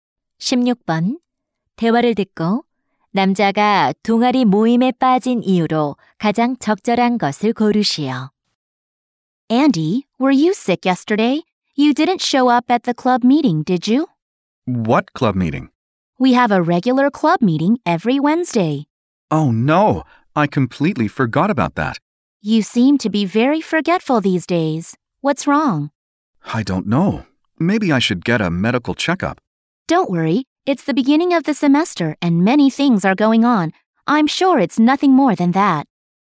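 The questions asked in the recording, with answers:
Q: 대화를 듣고 남자가 동아리 모임에 빠진 이유로 가장 적절한 것을 고르시오.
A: 모임을 완전히 잊어버려서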